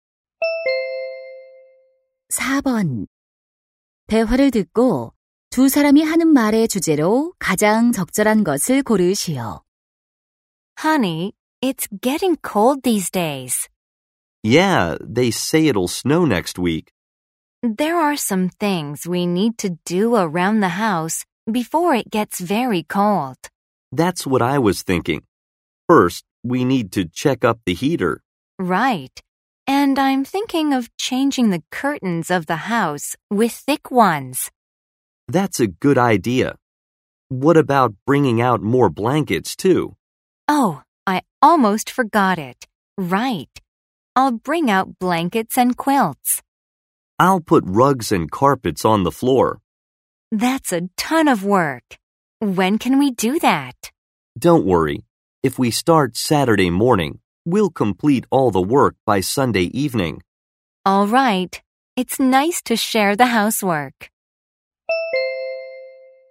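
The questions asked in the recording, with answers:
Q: 대화를 듣고 두 사람이 하는 말의 주제로 가장 적절한 것을 고르시오.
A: 추위에 대비한 집안 준비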